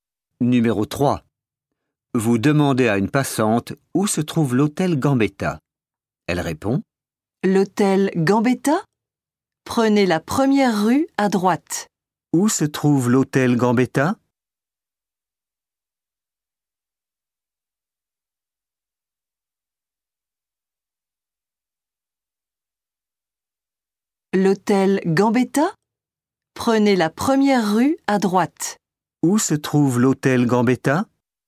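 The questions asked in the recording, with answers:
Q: Où se trouve l'hôtel Gambetta?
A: la première rue à droite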